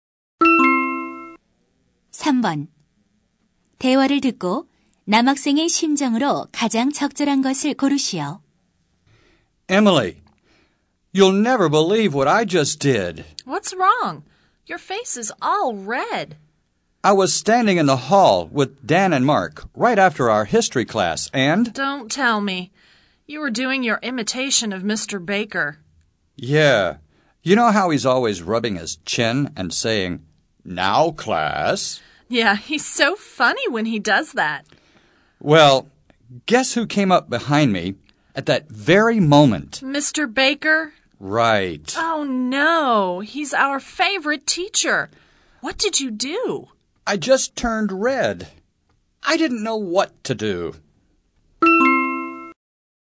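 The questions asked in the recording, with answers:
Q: 대화를 듣고 남학생의 심정으로 가장 적절한 것을 고르시오.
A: 당황스럽다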